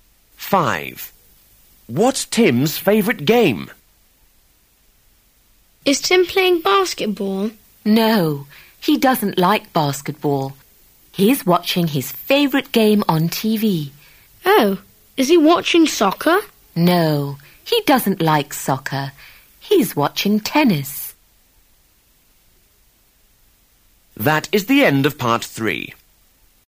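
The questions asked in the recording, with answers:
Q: What's Tim's favourite game?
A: Tennis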